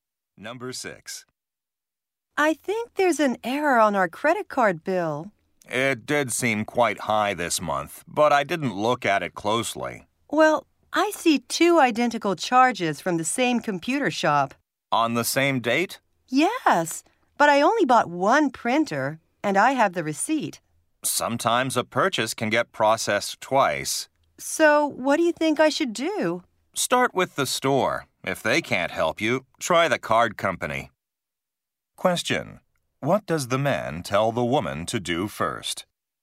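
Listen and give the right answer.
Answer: Contact the computer store.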